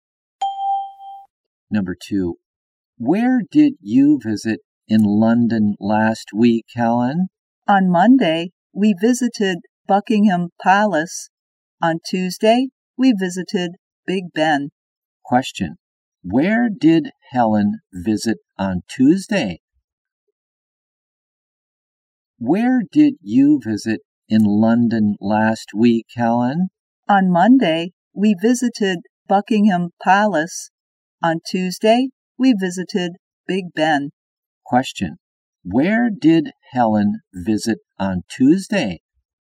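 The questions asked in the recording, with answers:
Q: Where did Helen visit on Tuesday?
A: Big Ben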